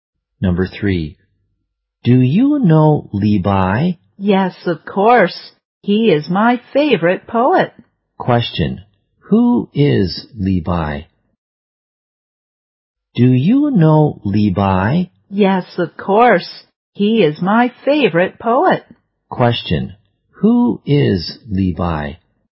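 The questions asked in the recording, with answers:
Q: who is Levi?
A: A poet (the speaker's favorite poet).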